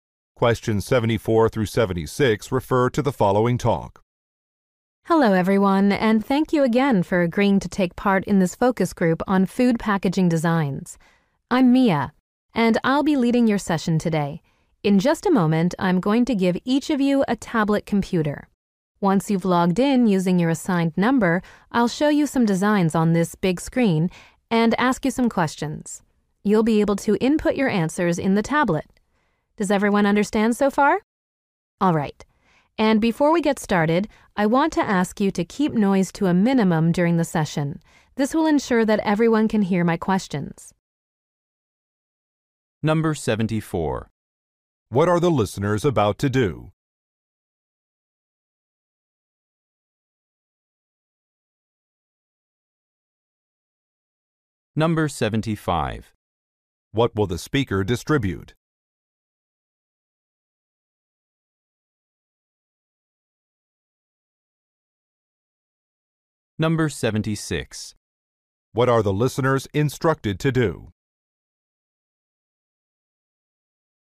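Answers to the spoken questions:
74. Take part in a focus group on food packaging designs
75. Tablet computers
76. Keep noise to a minimum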